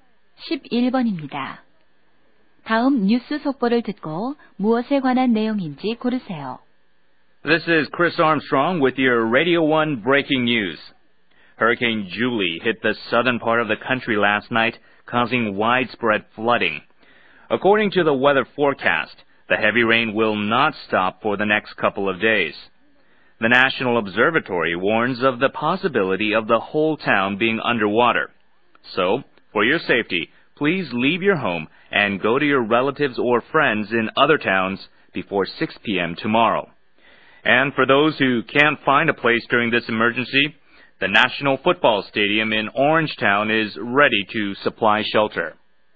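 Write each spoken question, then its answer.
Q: 다음 뉴스 속보를 듣고 무엇에 관한 내용인지 고르세요.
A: 허리케인으로 인한 홍수와 대피 안내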